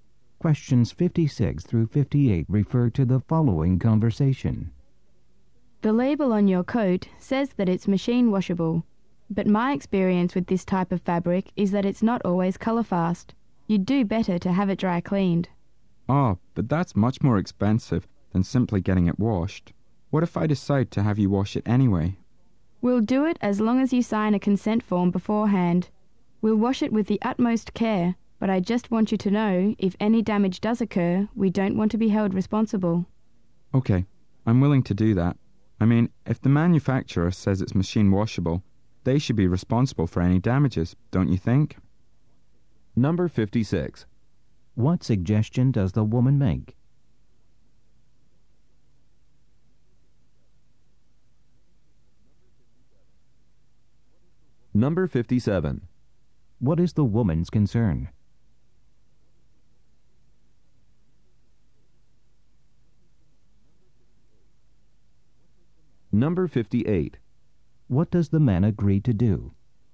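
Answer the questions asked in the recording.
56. Have the coat dry cleaned
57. The fabric may not be colorfast
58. Sign a consent form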